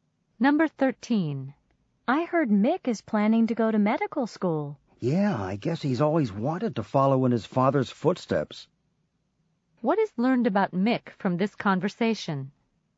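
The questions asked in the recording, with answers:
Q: What is learned about Mick from this conversation?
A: His father is a doctor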